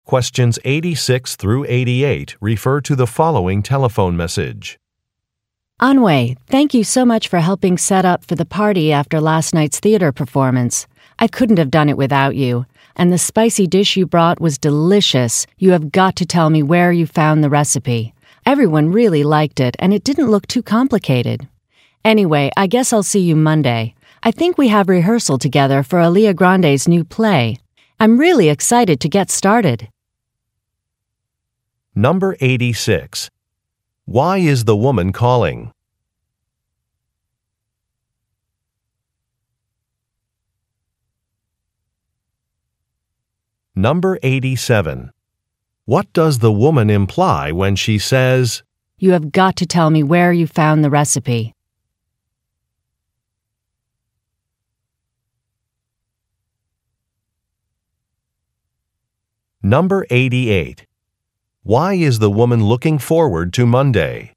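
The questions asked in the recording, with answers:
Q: Why is the woman calling?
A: To thank the listener for helping set up for the party

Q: Why is the woman looking forward to Monday?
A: They start rehearsals for a new play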